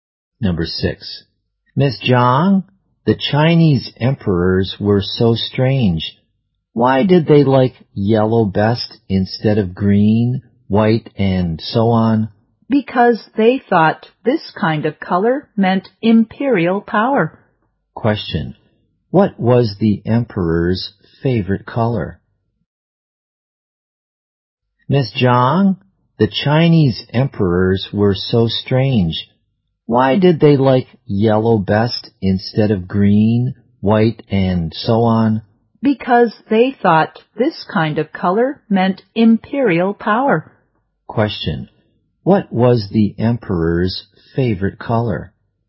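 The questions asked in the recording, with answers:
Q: Question. What was the emperor's favorite color?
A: Yellow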